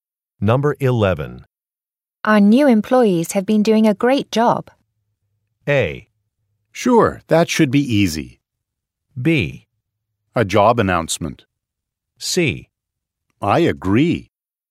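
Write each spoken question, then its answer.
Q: Our new employees have been doing a great job.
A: C: I agree.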